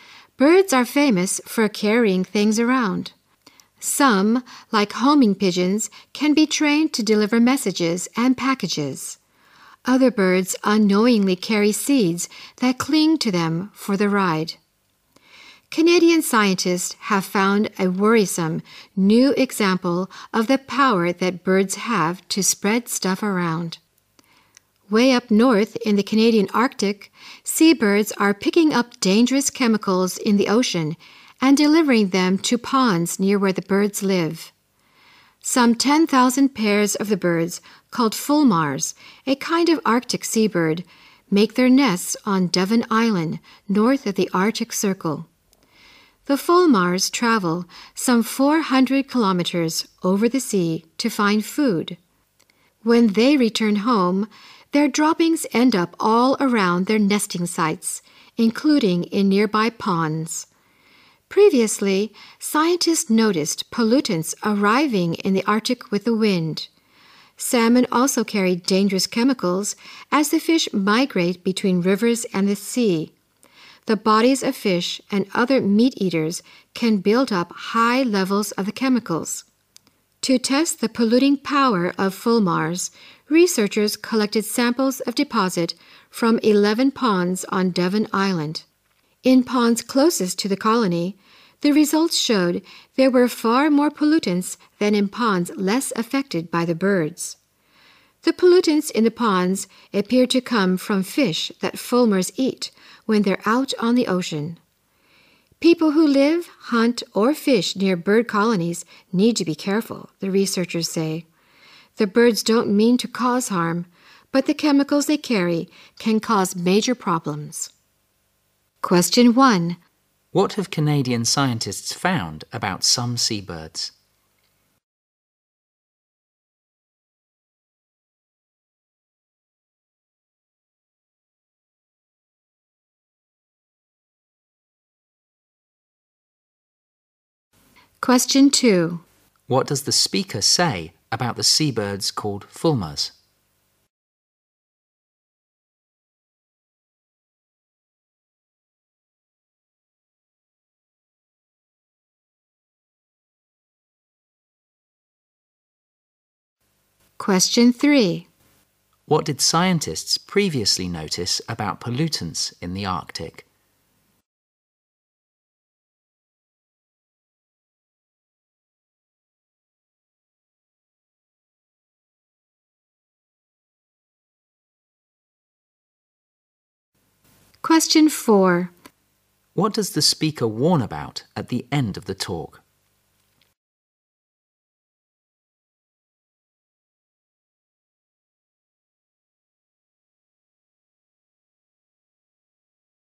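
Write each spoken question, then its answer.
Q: What have Canadian scientists found about some seabirds?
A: They carry dangerous chemicals from the ocean to ponds near their homes.

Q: What did scientists previously notice about pollutants in the Arctic?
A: They arrived with the wind.

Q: What does the speaker warn about at the end of the talk?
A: People living, hunting or fishing near bird colonies need to be careful.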